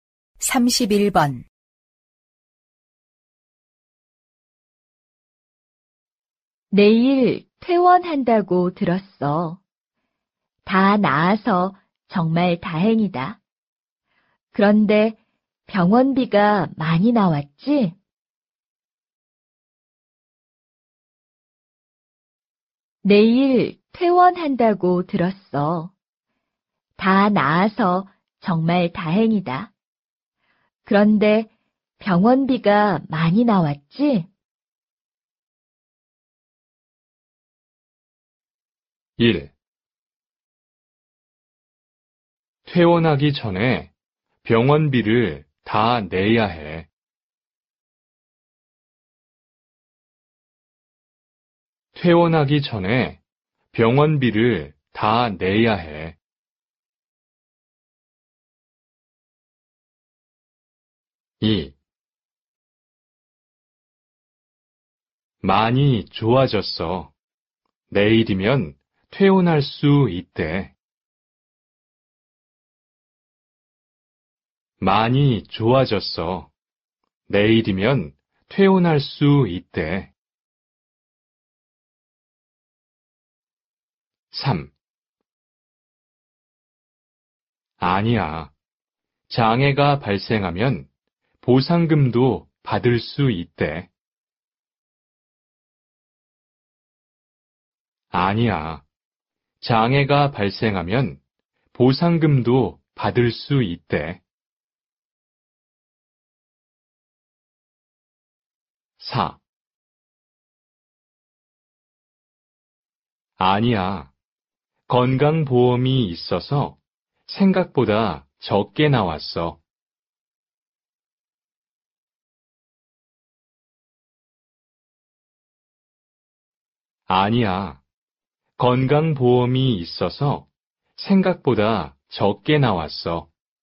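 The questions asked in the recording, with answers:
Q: 내일 퇴원한다고 들었어. 다 나아서 정말 다행이다. 그런데 병원비가 많이 나왔지?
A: 4: 아니야. 건강보험이 있어서 생각보다 적게 나왔어.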